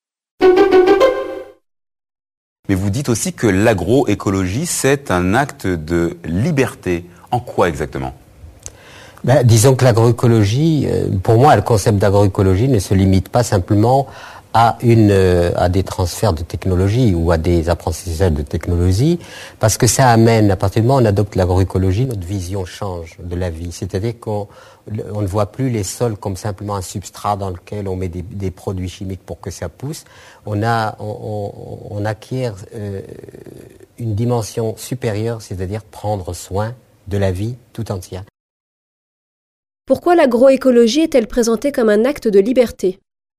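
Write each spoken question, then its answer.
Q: Pourquoi l'agroécologie est-elle présentée comme un acte de liberté ?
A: Parce qu'elle change notre vision de la vie : on ne voit plus les sols comme un simple substrat, on prend soin de la vie tout entière.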